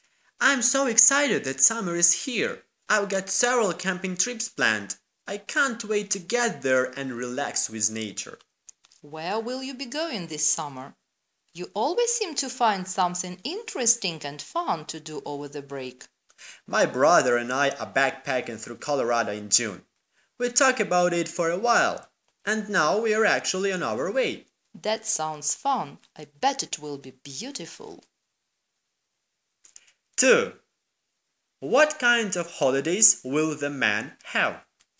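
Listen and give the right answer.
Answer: Backpacking through Colorado with his brother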